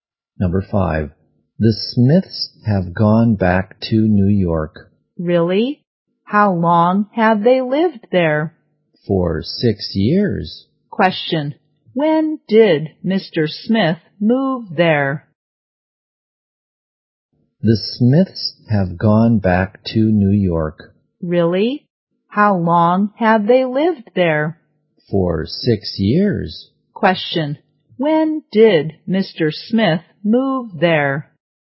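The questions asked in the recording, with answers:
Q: when did Mr. Smith move there?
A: 6 years ago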